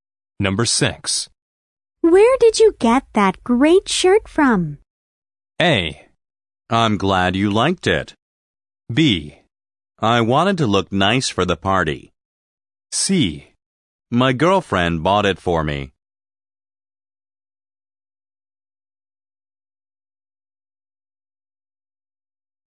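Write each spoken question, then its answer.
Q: Where did you get that great shirt from?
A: C: My girlfriend bought it for me.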